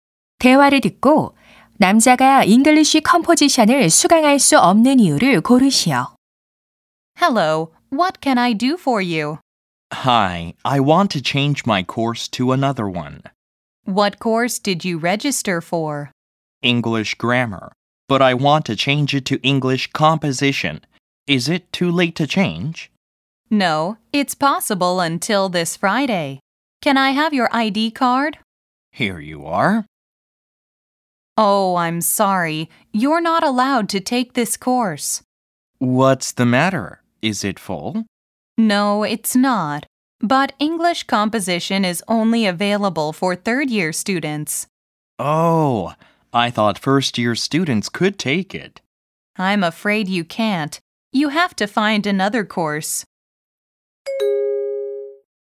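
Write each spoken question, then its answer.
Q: 대화를 듣고 남자가 잉글리쉬 컴포지션을 수강할 수 없는 이유를 고르시오.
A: 3학년 학생만 수강할 수 있어서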